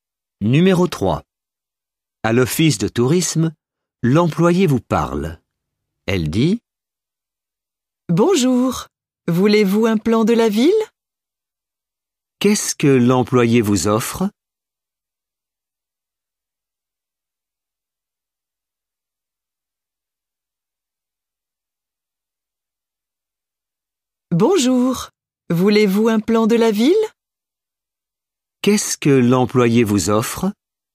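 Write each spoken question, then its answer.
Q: Qu'est-ce que l'employé vous offre?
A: un plan de la ville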